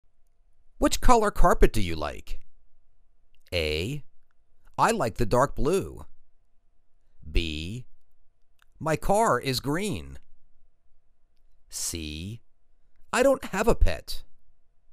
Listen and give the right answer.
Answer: I like the dark blue.